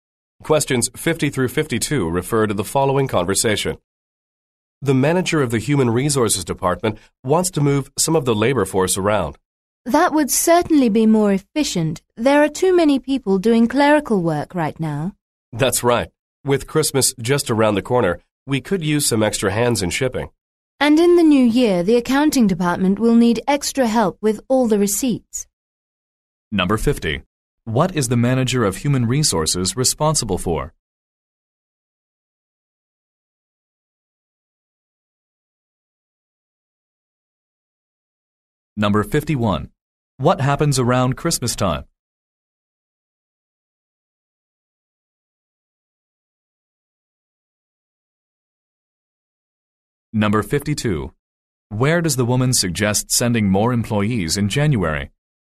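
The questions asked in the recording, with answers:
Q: What is the manager of human resources responsible for?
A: The labor force (staff)

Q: What happens around Christmas time?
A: Shipping needs extra help

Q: Where does the woman suggest sending more employees in January?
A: The accounting department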